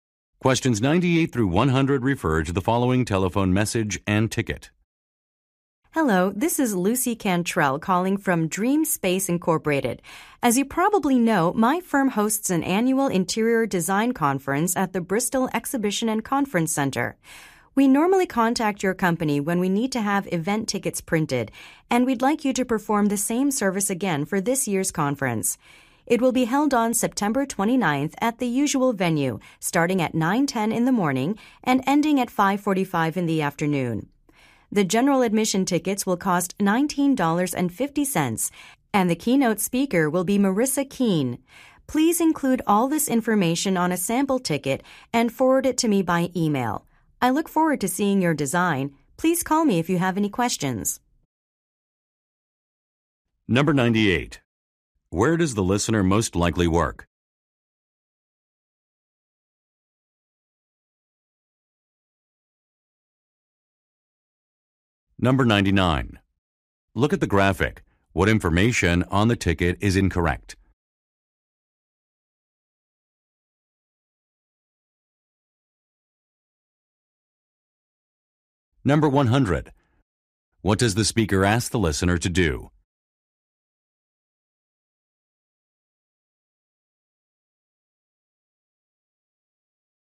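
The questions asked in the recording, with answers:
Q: Where does the listener most likely work?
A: At a printing company

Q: What does the speaker ask the listener to do?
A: Email her a sample ticket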